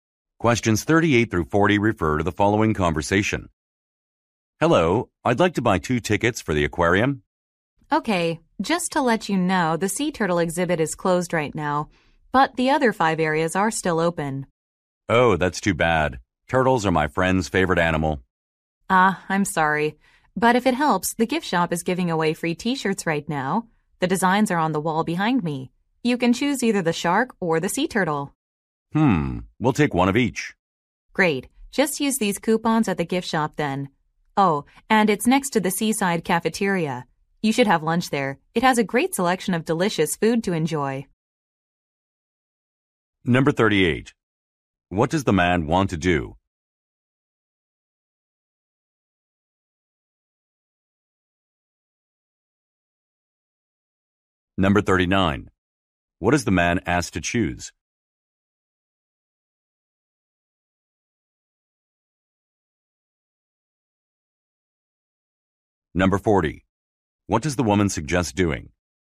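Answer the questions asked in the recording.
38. Buy two aquarium tickets
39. A T-shirt design
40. Having lunch at the seaside cafeteria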